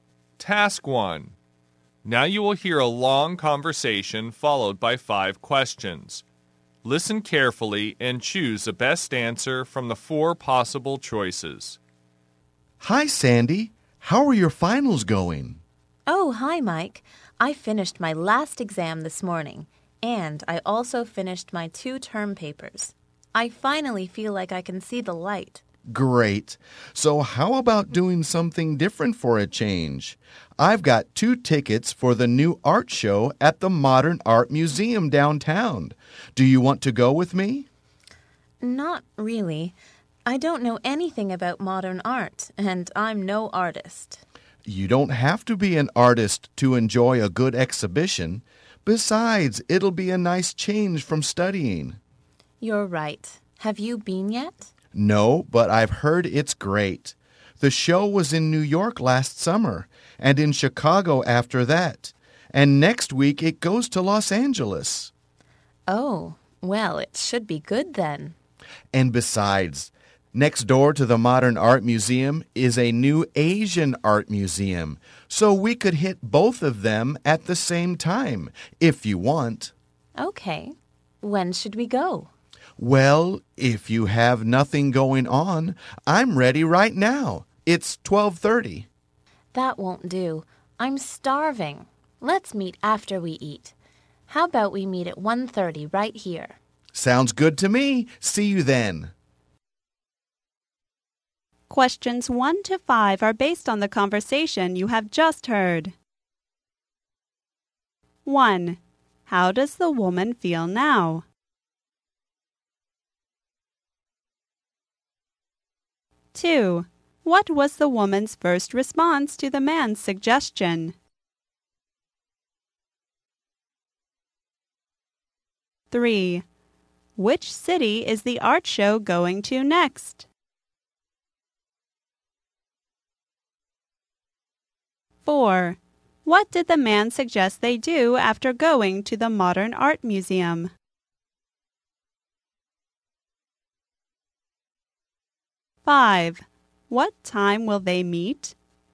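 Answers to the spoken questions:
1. Relieved, because her exams and papers are finished
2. She didn't want to go because she knows nothing about modern art
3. Los Angeles
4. Visit the new Asian art museum next door
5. 1:30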